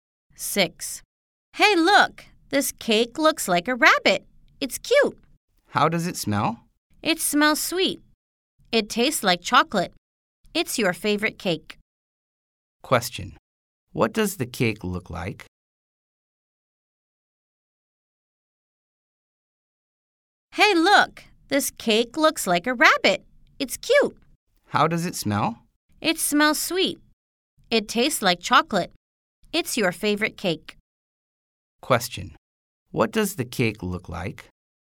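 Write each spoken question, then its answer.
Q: What does the cake look like?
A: A rabbit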